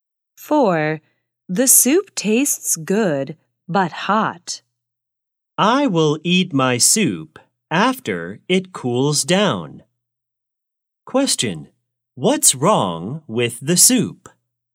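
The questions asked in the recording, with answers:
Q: What's wrong with the soup?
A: It's too hot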